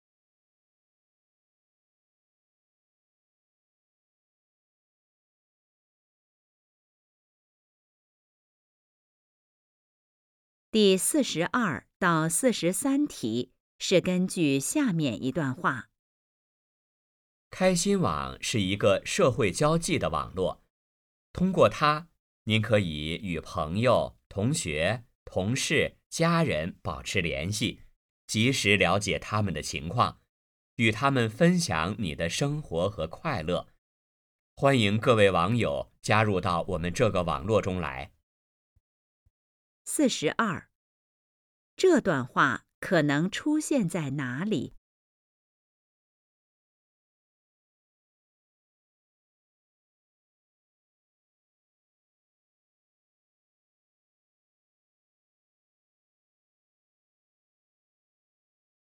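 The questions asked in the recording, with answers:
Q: 这段话可能出现在哪里?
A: 网站上

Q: 这段话谈的是什么内容?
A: 介绍开心网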